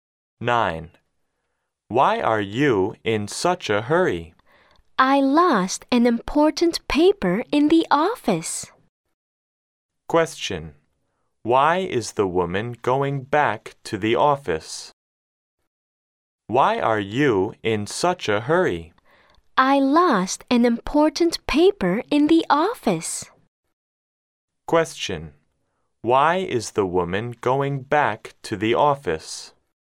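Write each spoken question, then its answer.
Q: Why is the woman going back to the office?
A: She lost an important paper there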